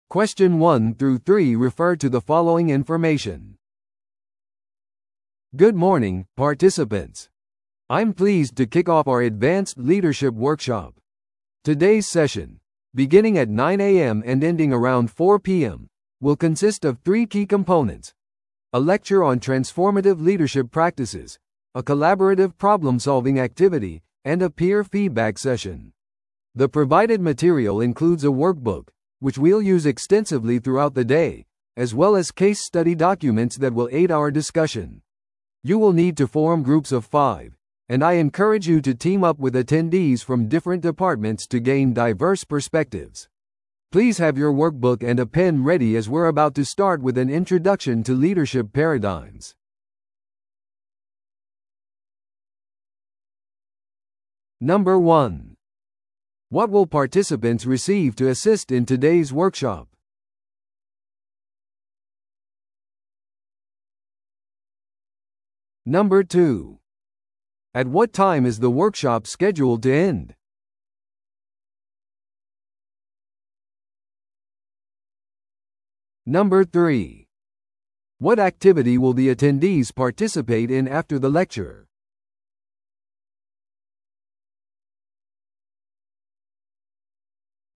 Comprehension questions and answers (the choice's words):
Listen to the audio below and answer the questions.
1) What will participants receive to assist in today's workshop?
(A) オンラインアクセスの資格情報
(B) ワークブックとケーススタディのドキュメント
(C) パーソナライズされた名札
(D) ランチの食事券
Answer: ワークブックとケーススタディのドキュメント

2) At what time is the workshop scheduled to end?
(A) 12pmで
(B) 2pmで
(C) 4pmで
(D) 5pmで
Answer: 4pmで

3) What activity will the attendees participate in after the lecture?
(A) バーチャルなチームビルディングの演習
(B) コーヒーブレイクとネットワーキング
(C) 共同問題解決活動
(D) 個人の反省タスク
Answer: 共同問題解決活動

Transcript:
I'm pleased to kick off our advanced leadership workshop. Today's session, beginning at 9am and ending around 4pm, will consist of three key components: a lecture on transformative leadership practices, a collaborative problem-solving activity, and a peer feedback session. The provided material includes a workbook, which we'll use extensively throughout the day, as well as case study documents that will aid our discussion. You will need to form groups of five, and I encourage you to team up with attendees from different departments to gain diverse perspectives. Please have your workbook and a pen ready as we're about to start with an introduction to leadership paradigms.